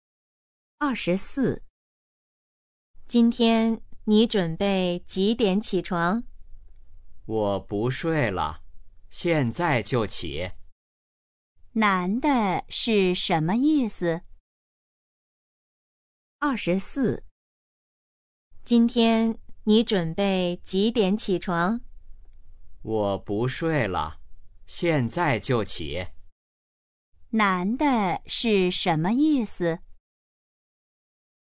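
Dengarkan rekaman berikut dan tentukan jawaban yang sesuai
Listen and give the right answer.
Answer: 现在就起床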